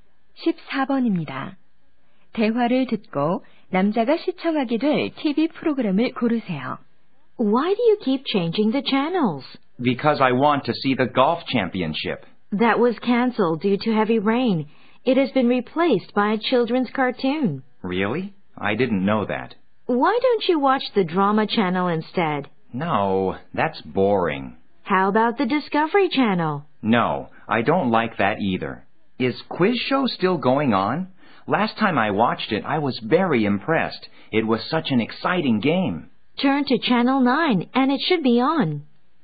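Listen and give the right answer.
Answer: 퀴즈 쇼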